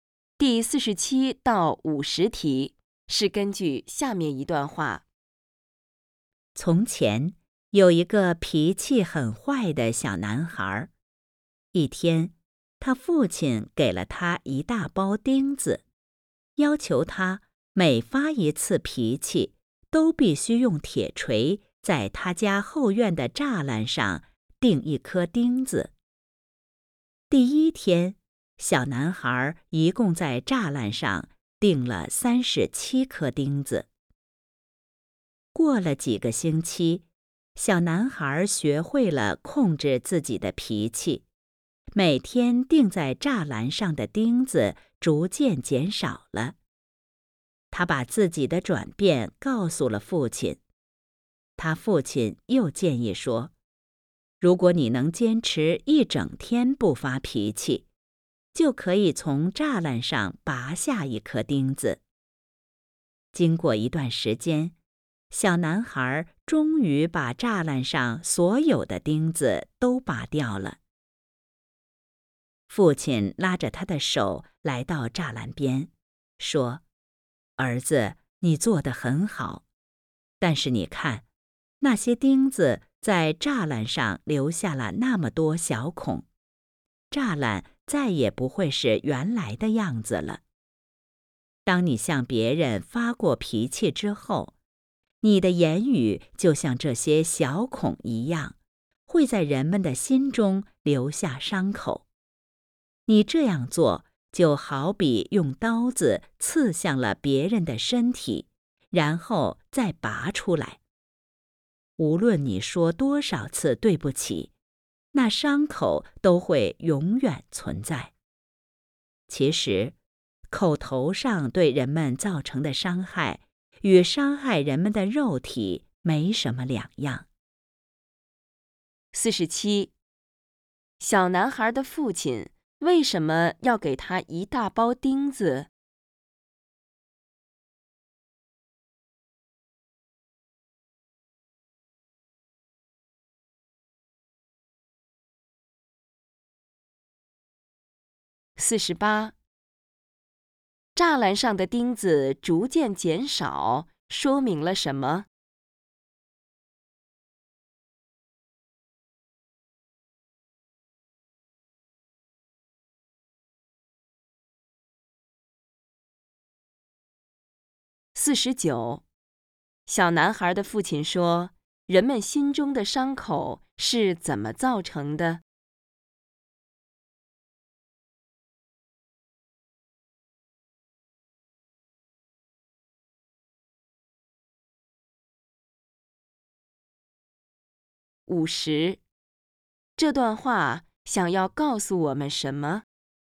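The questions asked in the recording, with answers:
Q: 小男孩的父亲为什么要给他一大包钉子?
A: 让他每发一次脾气就钉一颗,学会控制脾气

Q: 栅栏上的钉子逐渐减少,说明了什么?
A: 小男孩学会了控制自己的脾气

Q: 小男孩的父亲说,人们心中的伤口是怎么造成的?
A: 向别人发脾气时说的话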